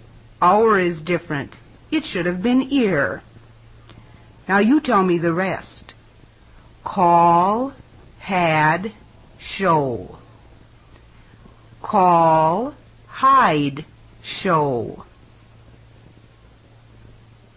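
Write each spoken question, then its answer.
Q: Call, had, show. Call, hide, show.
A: hide (it should have been had)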